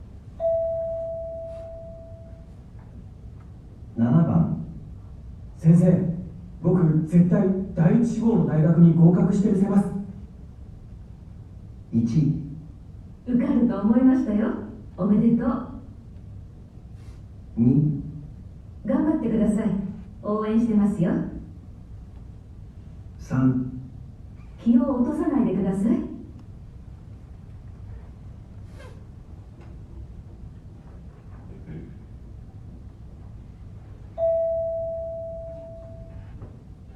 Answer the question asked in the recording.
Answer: 2

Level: N1 Listening · Test 2